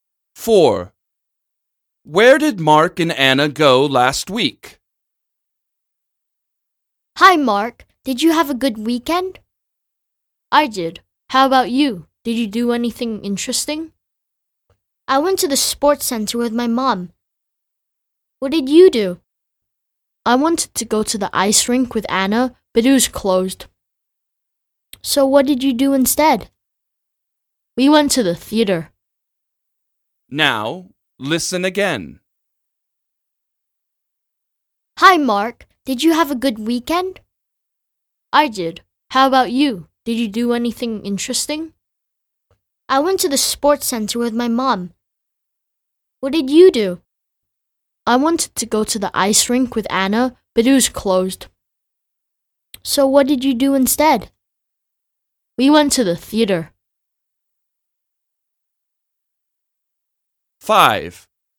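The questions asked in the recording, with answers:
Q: Where did Mark and Anna go last week?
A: To the theater.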